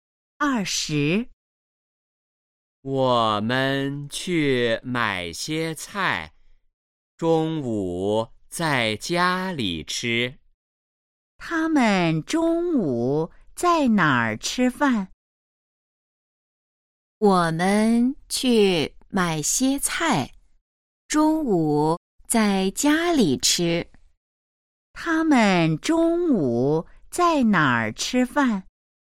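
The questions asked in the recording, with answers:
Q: 他们中午在哪儿吃饭?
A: 在家里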